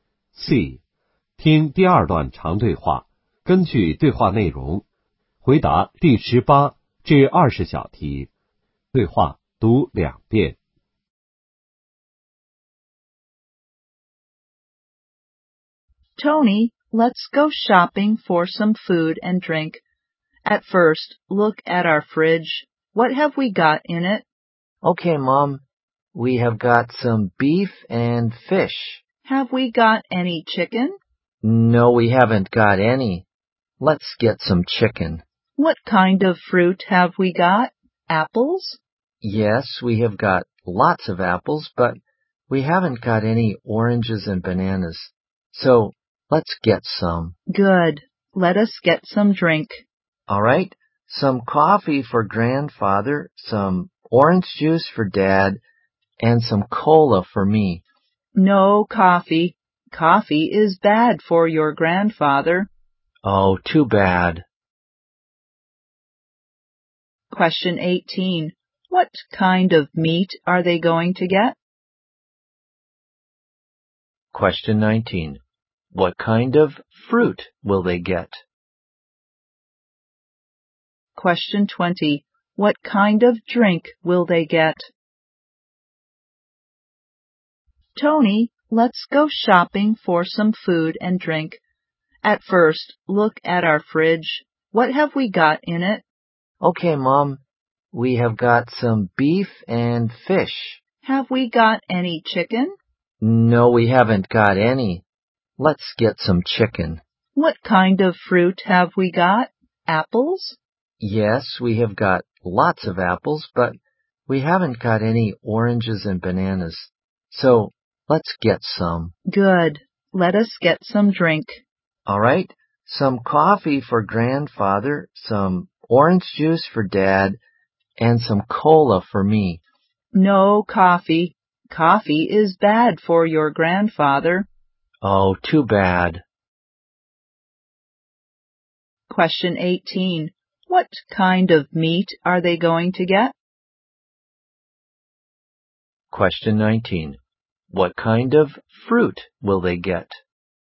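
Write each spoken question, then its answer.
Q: What kind of meat are they going to get?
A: Chicken

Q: What kind of fruit will they get?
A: Oranges and bananas

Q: What kind of drink will they get?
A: Orange juice and cola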